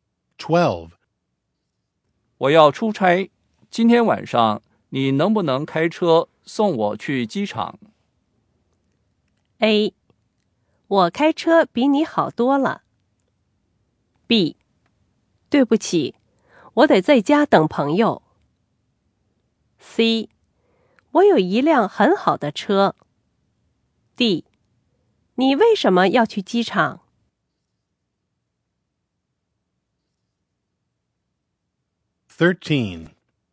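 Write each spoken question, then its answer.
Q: 我要出差,今天晚上你能不能开车送我去机场?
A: B: 对不起,我得在家等朋友。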